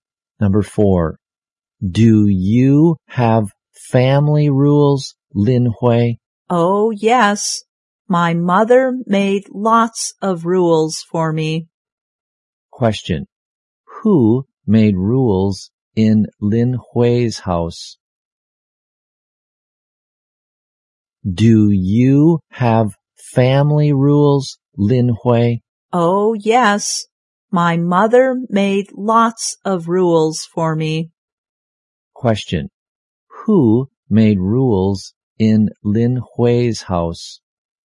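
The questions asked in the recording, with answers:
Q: Who made rules in Lin Hui's house?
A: Her mother.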